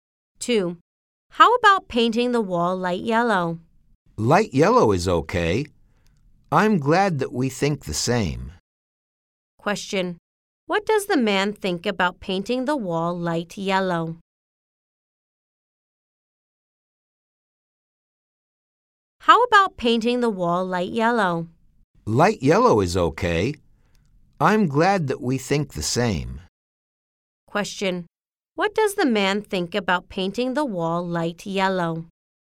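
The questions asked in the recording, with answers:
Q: What does the man think about painting the wall light yellow?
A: He agrees; light yellow is okay.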